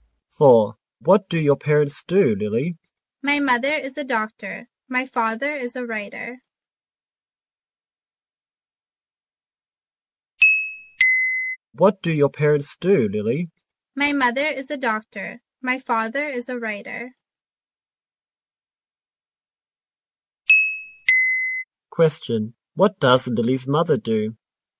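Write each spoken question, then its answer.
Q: What does Lily's mother do?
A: She is a doctor.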